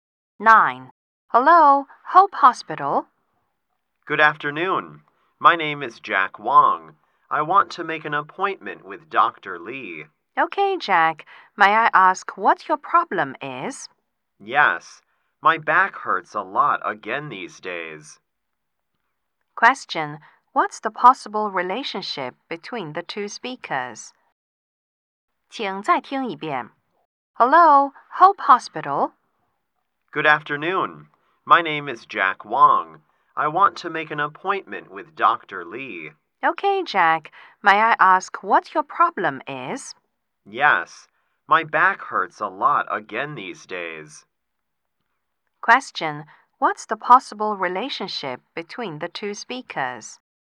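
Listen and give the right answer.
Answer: Receptionist and patient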